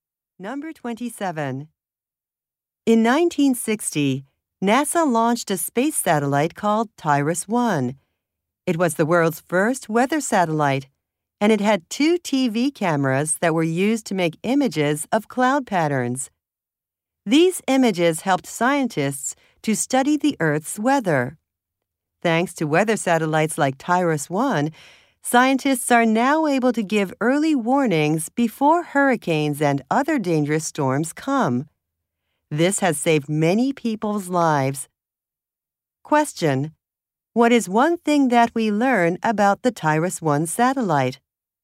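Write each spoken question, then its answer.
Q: What is one thing that we learn about the TIRIS-1 satellite?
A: It was the world's first weather satellite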